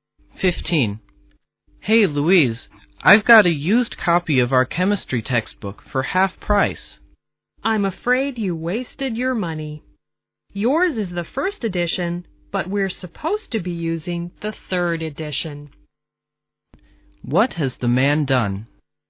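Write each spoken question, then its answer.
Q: What has the man done?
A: Bought the wrong (old) edition of the textbook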